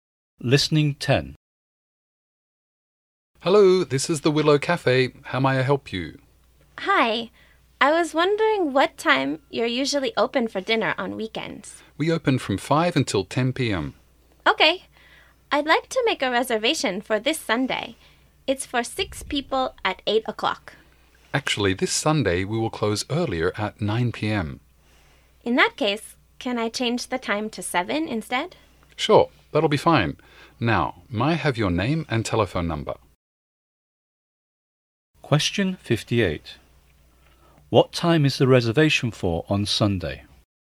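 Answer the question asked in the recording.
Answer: 7 o'clock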